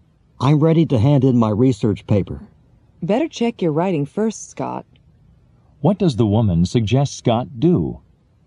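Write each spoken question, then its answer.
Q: What does the woman suggest Scott do?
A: Check his paper before handing it in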